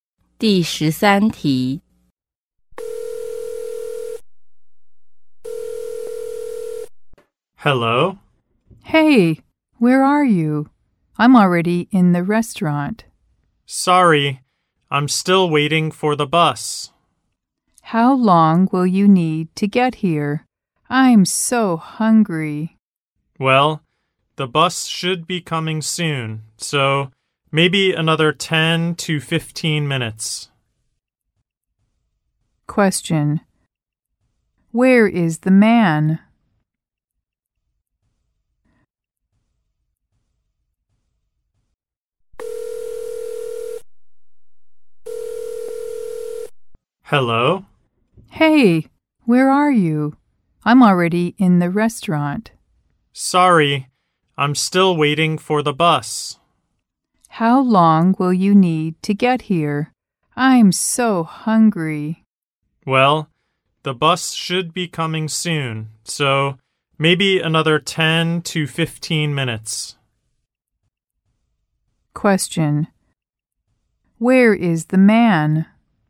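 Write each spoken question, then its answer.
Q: Where is the man?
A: At the bus stop, waiting for the bus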